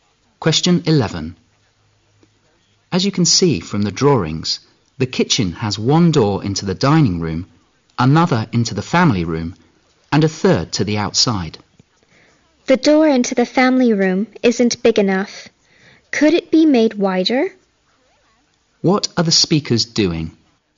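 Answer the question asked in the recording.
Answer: Discussing the kitchen design (remodeling plans)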